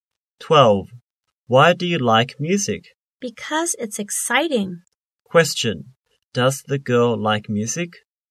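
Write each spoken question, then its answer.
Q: Question. Does the girl like music?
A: Yes, she does.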